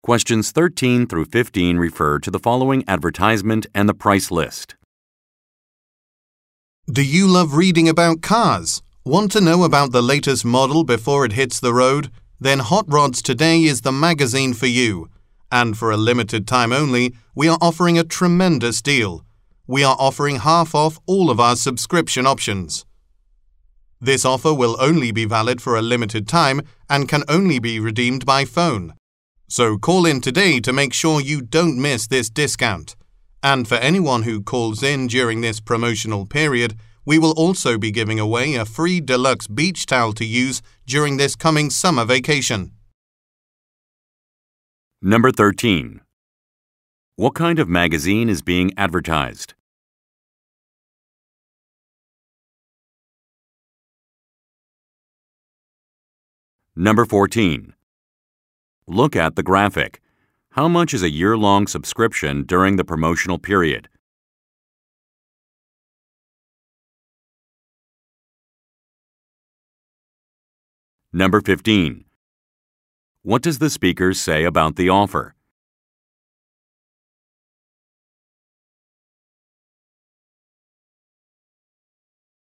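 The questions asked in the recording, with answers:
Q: What kind of magazine is being advertised?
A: A car magazine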